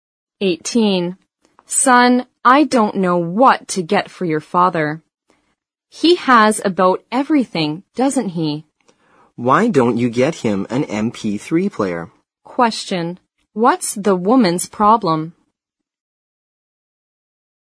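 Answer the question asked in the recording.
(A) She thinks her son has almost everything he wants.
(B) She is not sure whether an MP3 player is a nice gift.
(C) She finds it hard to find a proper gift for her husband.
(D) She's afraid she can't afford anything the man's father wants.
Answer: (C) She finds it hard to find a proper gift for her husband.

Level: 新编四级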